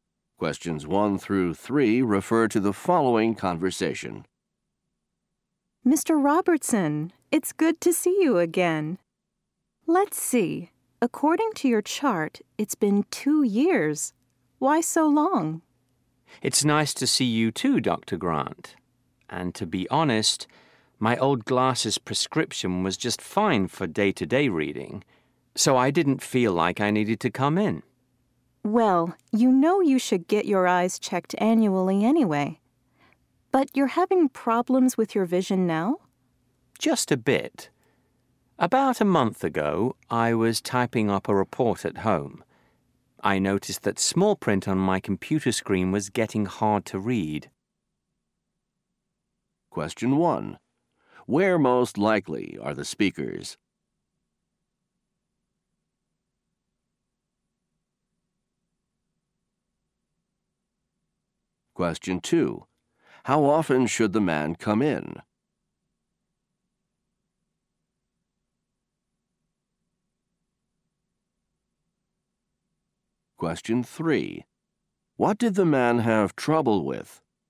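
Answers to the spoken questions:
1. At an eye doctor's office
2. Once a year
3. Reading small print on his computer screen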